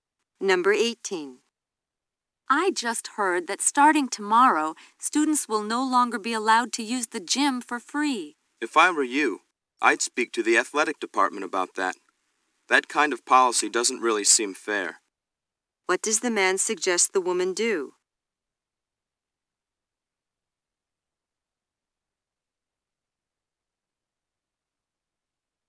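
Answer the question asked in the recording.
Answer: Talk to the athletic department.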